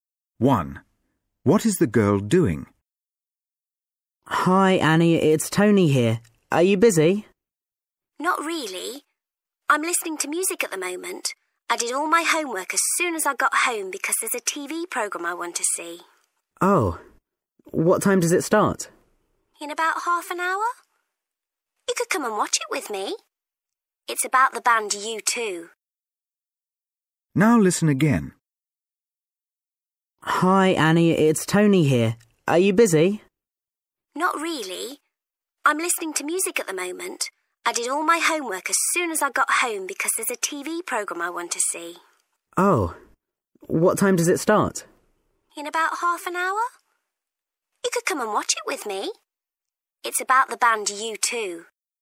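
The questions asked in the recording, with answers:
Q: What is the girl doing?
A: listening to music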